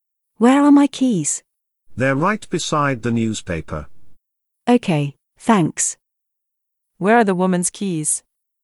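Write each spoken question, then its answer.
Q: Where are the woman's keys?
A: Beside the newspaper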